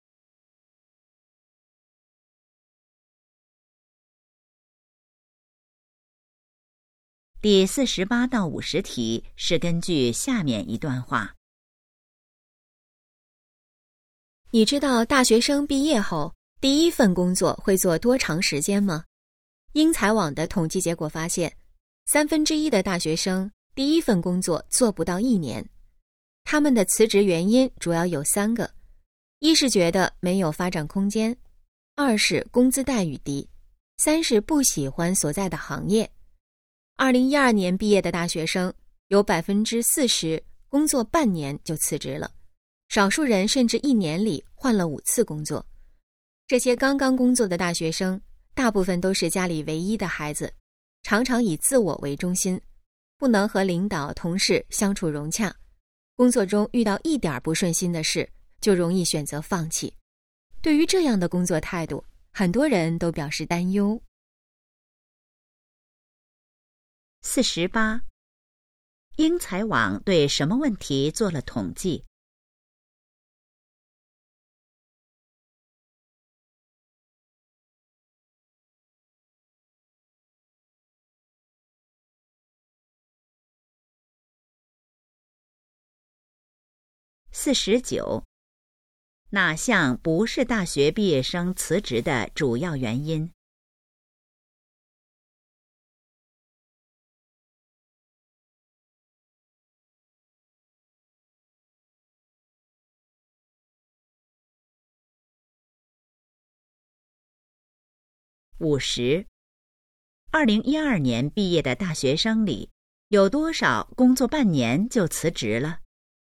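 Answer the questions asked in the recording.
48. 大学生第一份工作做多长时间
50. 40%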